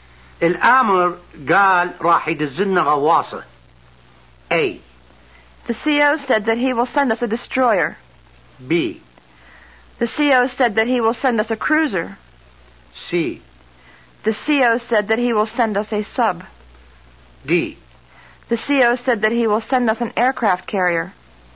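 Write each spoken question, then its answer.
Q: الأمر قال راح يدزلنا غواصة.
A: C: The CO said that he will send us a sub.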